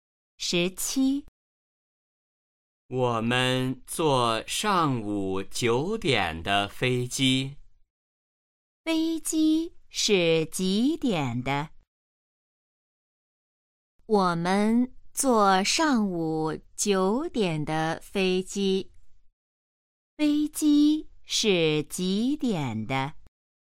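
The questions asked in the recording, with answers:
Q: 飞机是几点的?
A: 上午九点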